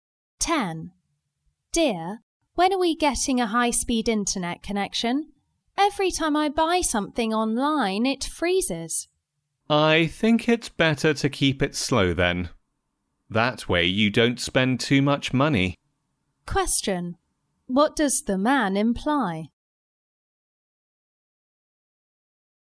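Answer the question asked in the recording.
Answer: A slow connection keeps the woman from spending too much money online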